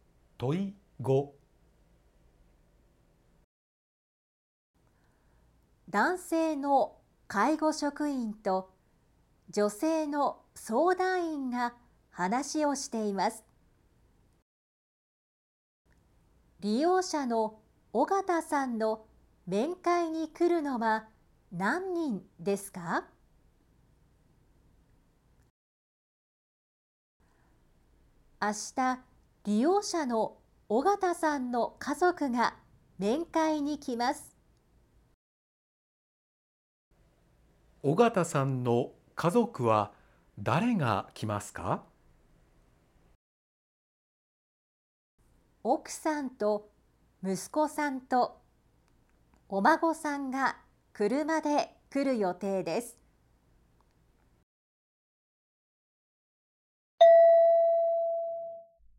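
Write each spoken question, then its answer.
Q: 利用者の尾形さんの面会に来るのは何人ですか?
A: 3人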